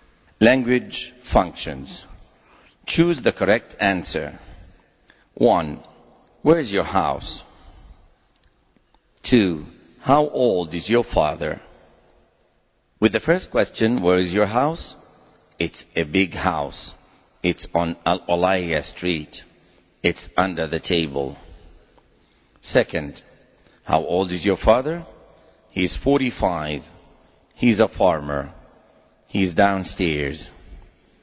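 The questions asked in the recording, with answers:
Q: Where is your house?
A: It's on Al-Olaya Street.

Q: How old is your father?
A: He's 45.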